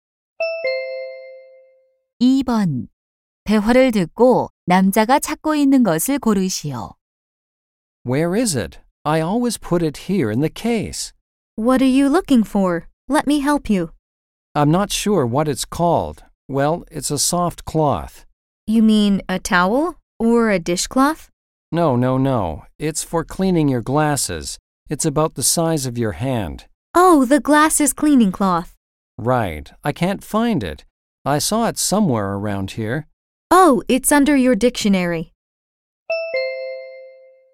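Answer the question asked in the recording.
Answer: 안경 닦는 천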